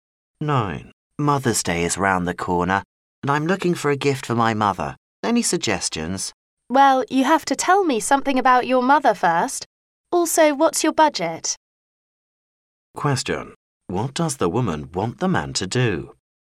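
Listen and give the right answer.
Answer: Tell her about his mother and his budget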